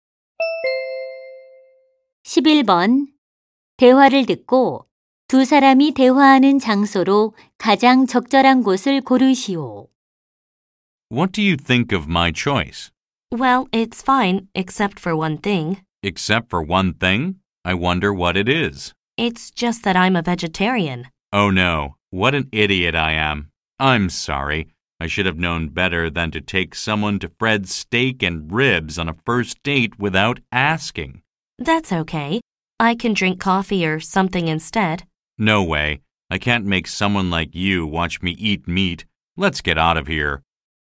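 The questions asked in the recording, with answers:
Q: 대화를 듣고 두 사람이 대화하는 장소로 가장 적절한 곳을 고르시오.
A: 스테이크 식당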